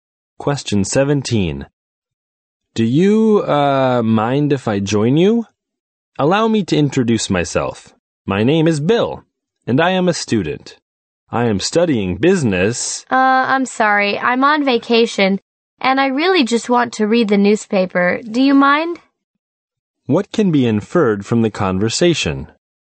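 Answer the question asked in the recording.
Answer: The woman doesn't want to talk to him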